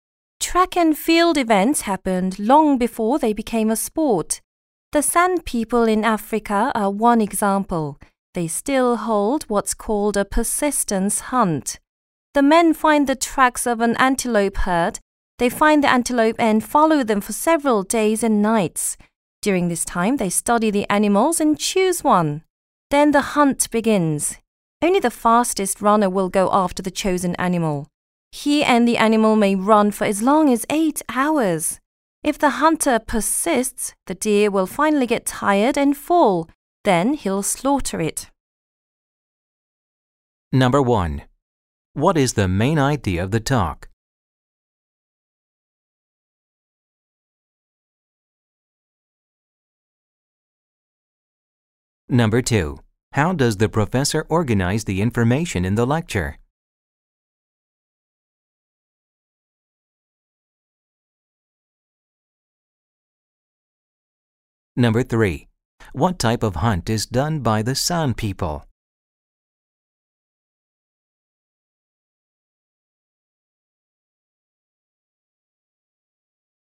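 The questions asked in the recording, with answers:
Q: What type of hunt is done by the San people?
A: A persistence hunt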